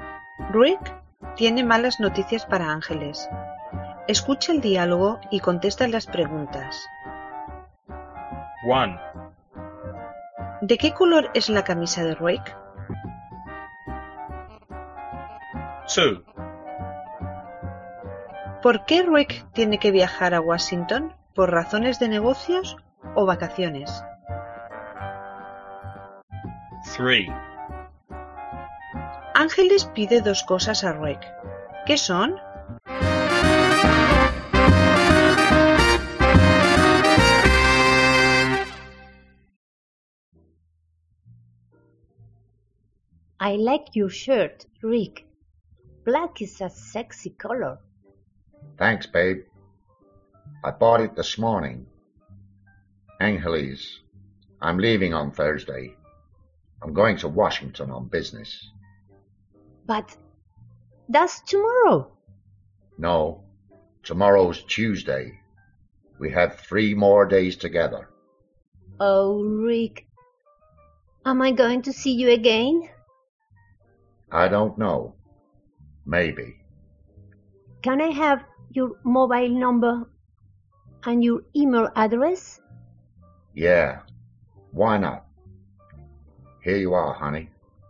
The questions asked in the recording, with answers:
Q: ¿De qué color es la camisa de Rick?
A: It's black.

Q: ¿Por qué Rick tiene que viajar a Washington?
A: Por razones de negocios.

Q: Ángeles pide dos cosas a Rick.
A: Su número de móvil y su dirección de correo electrónico.